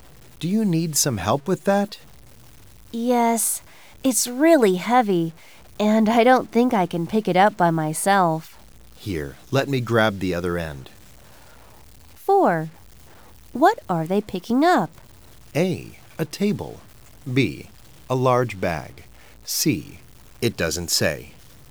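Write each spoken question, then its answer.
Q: What are they picking up?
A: C: It doesn't say.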